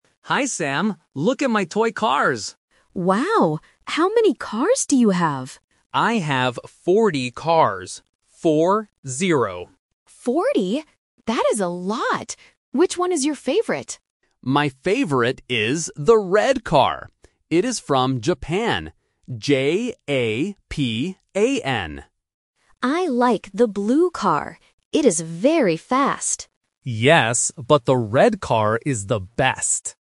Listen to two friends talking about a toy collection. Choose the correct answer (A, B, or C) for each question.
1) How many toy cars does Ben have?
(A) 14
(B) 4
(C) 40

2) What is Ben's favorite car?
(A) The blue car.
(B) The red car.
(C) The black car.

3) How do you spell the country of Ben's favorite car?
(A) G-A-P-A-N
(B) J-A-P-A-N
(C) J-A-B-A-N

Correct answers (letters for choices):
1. C
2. B
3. B

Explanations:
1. Ben clearly says he has "forty cars" and repeats "Four-zero". Option (A) "14" (fourteen) is the classic trap for the "-teen" and "-ty" sounds. Option (B) "4" is not correct.
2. Ben says, "My favorite is the red car." Option (A) is a trap because Sam says, "I like the blue car," but the question asks about Ben's favorite. Option (C) "black" is a color but is never mentioned.
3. Ben spells the name of the country clearly as "J-A-P-A-N". Option (A) uses a 'G' instead of a 'J', which is a common phonetic mistake. Option (C) uses a 'B' instead of a 'P'.

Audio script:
Ben: Hi, Sam. Look at my toy cars!
Sam: Wow! How many cars do you have?
Sam: Forty? That is a lot! Which one is your favorite?
Ben: My favorite is the red car. It is from Japan. J-A-P-A-N.
Sam: I like the blue car. It is very fast.
Ben: Yes, but the red car is the best.

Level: A1